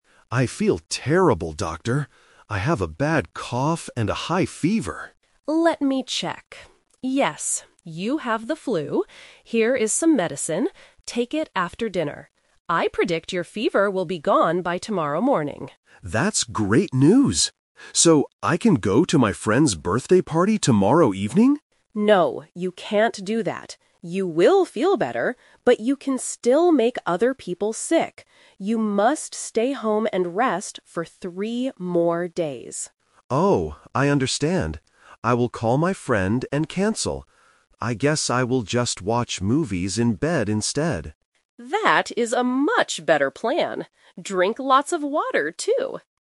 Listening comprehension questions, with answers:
Listen to the conversation between a doctor and a patient. Choose the correct answer (A, B, or C).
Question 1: What does the doctor predict will happen tomorrow morning?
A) The patient will start coughing more.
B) The patient's fever will be gone.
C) The patient will need to buy more medicine.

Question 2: What did the patient want to do tomorrow evening?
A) Go to a birthday party.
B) Watch movies in bed.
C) Go to work.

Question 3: Why does the doctor tell the patient to stay home?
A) Because the medicine will make him very tired.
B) Because he can give the flu to other people.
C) Because his fever will get worse at the party.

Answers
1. B
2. A
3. B

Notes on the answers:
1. The doctor explicitly states, "I predict your fever will be gone by tomorrow morning."
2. Upon hearing he will feel better, the patient asks, "So, I can go to my friend's birthday party tomorrow evening?"
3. The doctor explains the reason: "You will feel better, but you can still make other people sick."

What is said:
Patient: I feel terrible, Doctor. I have a bad cough and a high fever.
Doctor: Let me check... Yes, you have the flu. Here is some medicine. Take it after dinner. I predict your fever will be gone by tomorrow morning.
Patient: That's great news! So, I can go to my friend's birthday party tomorrow evening?
Doctor: No, you can't do that. You will feel better, but you can still make other people sick. You must stay home and rest for three more days.
Patient: Oh, I understand. I will call my friend and cancel. I guess I will just watch movies in bed instead.

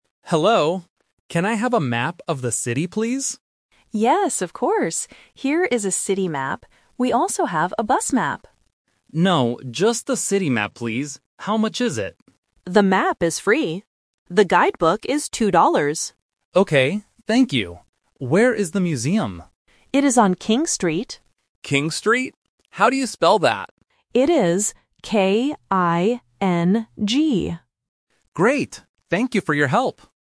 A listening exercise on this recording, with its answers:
Listen to the conversation at the information desk and choose the correct answer (A, B, or C).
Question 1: What kind of map does the tourist want?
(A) A bus map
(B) A city map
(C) A train map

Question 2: How much is the map?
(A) It is free.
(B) Two dollars.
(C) Three dollars.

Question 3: How does the clerk spell the name of the street?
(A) K-I-N-C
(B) R-I-N-G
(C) K-I-N-G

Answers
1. B
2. A
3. C

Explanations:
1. The tourist clearly asks for a "city map". The clerk offers a "bus map" (The Trap), but the tourist says "No, just the city map." Option (C) is not mentioned in the audio.
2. The clerk says, "The map is free." Option (B) is the trap because the clerk mentions "two dollars", but that is the price for the guide book, not the map. Option (C) is not mentioned.
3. The clerk spells the name of the street:: K-I-N-G. Option (A) is a spelling trap using the letter "C" which looks/sounds somewhat similar, and Option (B) uses "R", testing the student's ability to hear the first consonant correctly.

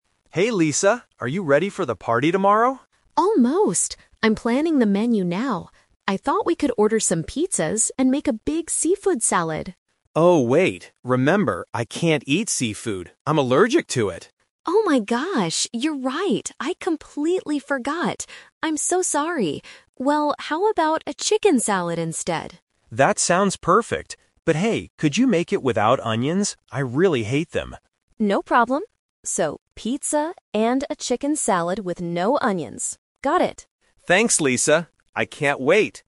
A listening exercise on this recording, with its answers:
Listen to the conversation between two friends and choose the correct answer (A, B, or C) for each question.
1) What are they going to have for the party?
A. Pizza and a seafood salad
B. Pizza and a chicken salad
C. Hamburgers and a chicken salad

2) Why doesn't Tom want the seafood salad?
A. He hates the taste of it.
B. He is allergic to it.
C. It is too expensive.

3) What does Tom ask Lisa to leave out of the food?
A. Onions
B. Tomatoes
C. Chicken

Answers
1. B
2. B
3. A

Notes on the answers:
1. At the end of the conversation, Lisa confirms they will have "pizza and a chicken salad." Option (A) is the trap; Lisa suggests a seafood salad at first, but they change the plan. Option (C) is plausible for a party, but hamburgers are never mentioned.
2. When Lisa suggests seafood, Tom clearly states, "I can't eat seafood. I'm allergic to it." Option (A) is a trap; Tom talks about "hating" something later, but he hates onions, not seafood. Option (C) is not mentioned in the audio.
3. Tom agrees to the chicken salad but adds, "could you make it without onions? I really hate them." Option (C) is a trap; chicken is the main ingredient he wants, not the one he wants left out. Option (B) is not mentioned.

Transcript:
Tom: Hey Lisa, are you ready for the party tomorrow?
Lisa: Almost! I'm planning the menu now. I thought we could order some pizzas and make a big seafood salad.
Tom: Oh, wait. Remember, I can't eat seafood. I'm allergic to it.
Lisa: Oh my gosh, you're right! I completely forgot. I'm so sorry. Well, how about a chicken salad instead?
Tom: That sounds perfect. But hey, could you make it without onions? I really hate them.
Lisa: No problem. So, pizza and a chicken salad with no onions. Got it!

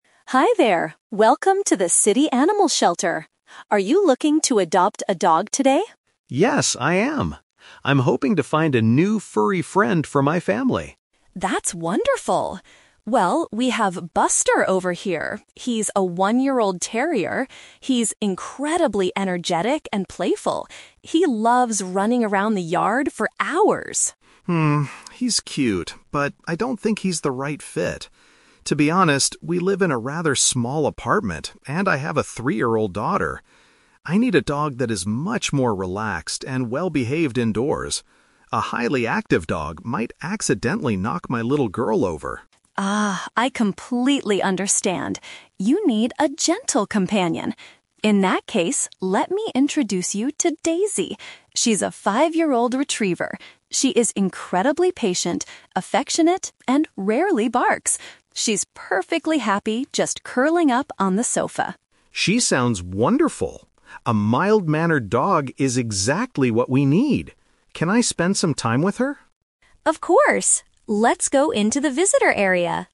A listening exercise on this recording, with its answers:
Listen to a conversation between a customer and an animal shelter worker. For each question, choose the correct answer A, B, or (C).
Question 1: Why does Mark decide NOT to adopt Buster?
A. He is worried the dog might be too rough for his young child.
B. He wants a pet that requires a lot of daily outdoor exercise.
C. He thinks Buster is too old to be trained properly.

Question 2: What kind of home environment does the customer currently have?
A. A large house with a big garden.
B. A flat with limited space and a toddler.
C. A quiet home with no children or other pets.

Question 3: How does the shelter worker describe Daisy's personality?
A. Shy and easily frightened.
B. Loud and extremely playful.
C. Calm and very loving.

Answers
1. A
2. B
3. C

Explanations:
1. Mark explains that he needs a dog that is "relaxed" and worries that a highly active dog "might accidentally knock my little girl over." This means he is worried the dog will be too rough.
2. Mark states that he lives in a "rather small apartment" and has a "three-year-old daughter." The word "flat" is a B1 synonym for apartment, and a "toddler" means a young child.
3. Sarah describes Daisy as "patient, affectionate" and Mark calls her "mild-mannered." The word "loving" is a synonym for affectionate, and "calm" is a synonym for patient/mild-mannered.

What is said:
Sarah: Hi there! Welcome to the city animal shelter. Are you looking to adopt a dog today?
Mark: Yes, I am. I'm hoping to find a new furry friend for my family.
Sarah: That's wonderful. Well, we have Buster over here. He's a one-year-old terrier. He's incredibly energetic and playful. He loves running around the yard for hours.
Mark: Hmm, he's cute, but I don't think he's the right fit. To be honest, we live in a rather small apartment, and I have a three-year-old daughter. I need a dog that is much more relaxed and well-behaved indoors. A highly active dog might accidentally knock my little girl over.
Sarah: Ah, I completely understand. You need a gentle companion. In that case, let me introduce you to Daisy. She's a five-year-old retriever. She is incredibly patient, affectionate, and rarely barks. She's perfectly happy just curling up on the sofa.
Mark: She sounds wonderful. A mild-mannered dog is exactly what we need. Can I spend some time with her?

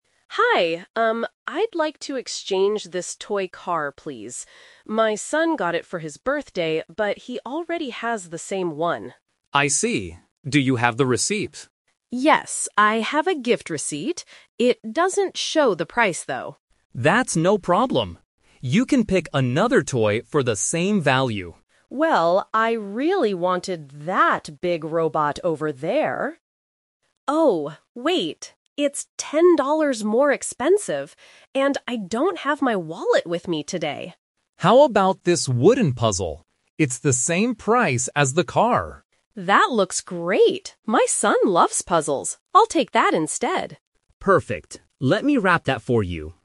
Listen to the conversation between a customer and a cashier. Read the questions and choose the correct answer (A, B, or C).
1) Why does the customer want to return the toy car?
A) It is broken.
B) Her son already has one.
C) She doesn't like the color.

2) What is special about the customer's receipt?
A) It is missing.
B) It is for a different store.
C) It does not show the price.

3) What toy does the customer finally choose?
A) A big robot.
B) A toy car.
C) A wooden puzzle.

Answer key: 1B, 2C, 3C

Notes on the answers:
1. The customer says, "...but he already has the same one," which means it is a duplicate gift.
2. The customer explains, "I have a gift receipt. It doesn't show the price, though."
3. This is "The Twist". She wanted the robot, but changed her mind because it was too expensive and she didn't have her wallet. She ends by saying, "I'll take the puzzle instead."

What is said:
Customer: Hi. Um, I'd like to exchange this toy car, please. My son got it for his birthday, but he already has the same one.
Cashier: I see. Do you have the receipt?
Customer: Yes, I have a gift receipt. It doesn't show the price, though.
Cashier: That's no problem. You can pick another toy for the same value.
Customer: Well, I really wanted that big robot over there... Oh, wait. It's ten dollars more expensive, and I don't have my wallet with me today.
Cashier: How about this wooden puzzle? It's the same price as the car.
Customer: That looks great! My son loves puzzles. I'll take that instead.

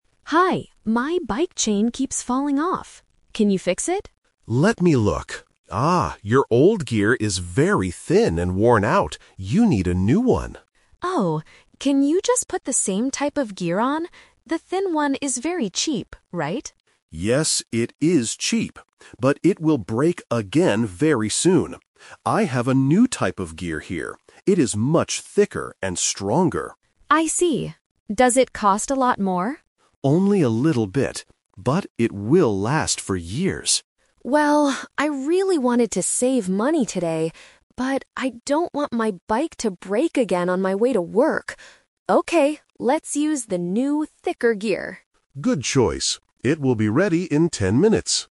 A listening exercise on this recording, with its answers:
Listen to the conversation and choose the correct answer (A, B, or C).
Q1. What is the problem with the customer's old gear?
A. It is too thick.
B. It is thin and worn out.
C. It is too heavy.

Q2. What does the mechanic say about the new gear?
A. It is very cheap.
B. It is much thicker and stronger.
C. It will break very soon.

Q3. Which gear does the customer decide to buy?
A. The cheap, thin gear, to save money.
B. The new, thicker gear, so it won't break again.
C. He decides to buy a brand new bike.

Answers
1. B
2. B
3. B

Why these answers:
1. The mechanic checks the bike and says, "your old gear is very thin and worn out." Option A is a trap because being "thick" is a feature of the new gear. Option C is a plausible guess for bike parts but is not mentioned in the audio.
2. The mechanic introduces the new type of gear and says, "It is much thicker and stronger." Option A is a trap because the thin/old gear is the cheap one. Option C is also a trap; the mechanic says the old type of gear will break very soon, not the new one.
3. This question uses the "Twist" technique. The customer initially wants to buy the cheap, thin gear because he wants to save money. However, he changes his mind because he doesn't want his bike to break again on his way to work. He chooses the thicker gear. Option A is the main trap (his original plan). Option C is incorrect.

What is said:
Customer: Hi, my bike chain keeps falling off. Can you fix it?
Mechanic: Let me look. Ah, your old gear is very thin and worn out. You need a new one.
Customer: Oh. Can you just put the same type of gear on? The thin one is very cheap, right?
Mechanic: Yes, it is cheap. But it will break again very soon. I have a new type of gear here.
Customer: I see. Does it cost a lot more?
Mechanic: Only a little bit. But it will last for years.
Customer: Well, I really wanted to save money today, but I don't want my bike to break again on my way to work. Okay, let's use the new, thicker gear.

